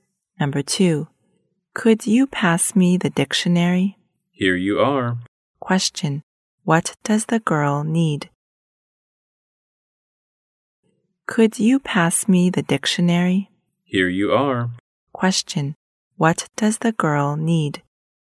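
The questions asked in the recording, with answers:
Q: Question, what does the girl need?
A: A dictionary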